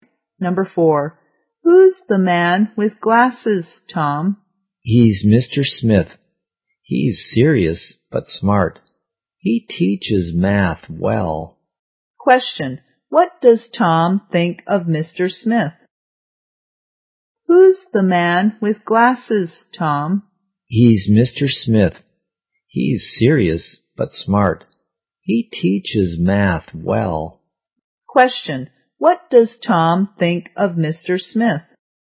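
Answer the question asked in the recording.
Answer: He's serious but smart.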